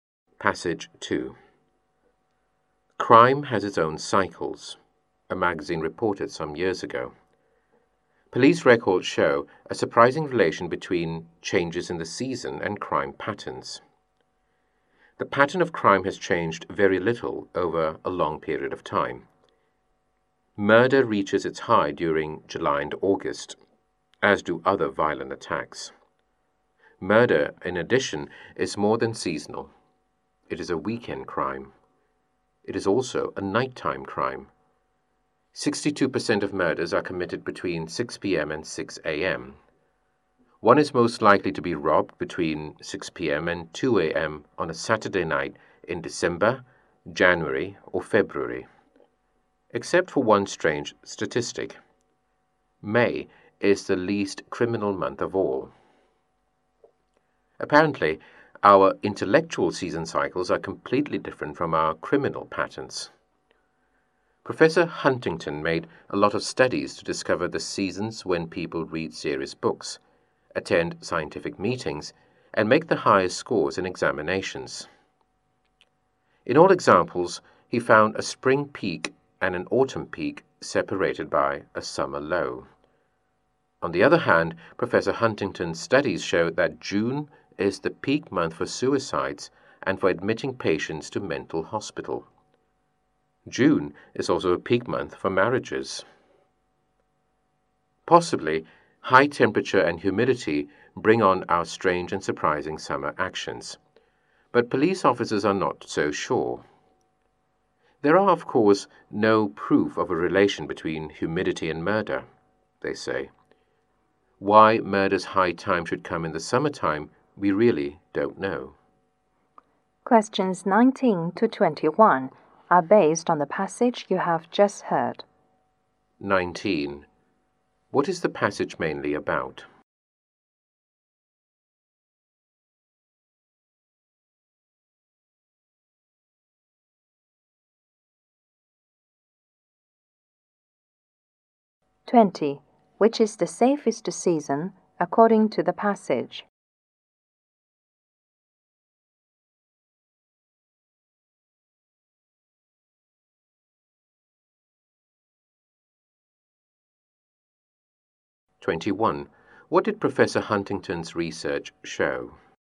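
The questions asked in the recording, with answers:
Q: What is the passage mainly about?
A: The relation between seasons and crime patterns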